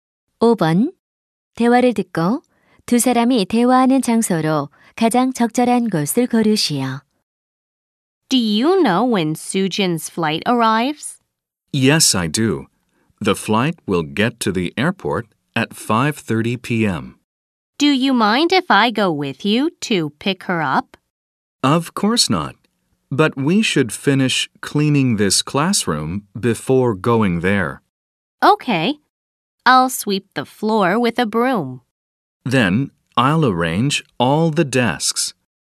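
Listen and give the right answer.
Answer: 교실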